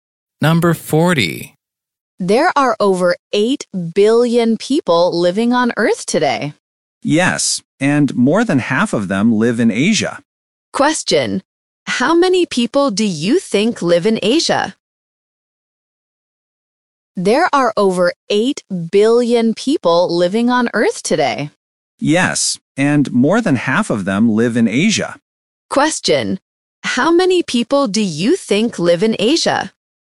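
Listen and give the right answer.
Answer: More than 4 billion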